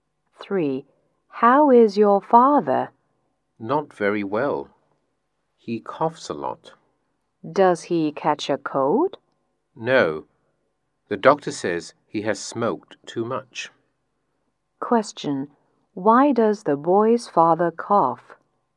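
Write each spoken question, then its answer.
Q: Why does the boy's father cough?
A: He has smoked too much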